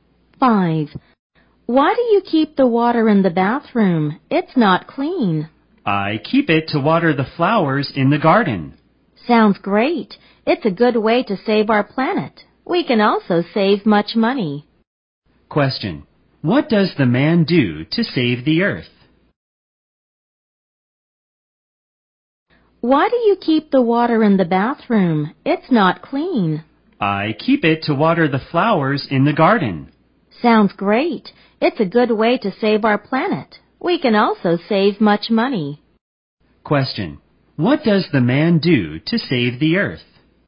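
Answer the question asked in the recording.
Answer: He keeps bathroom water to water the flowers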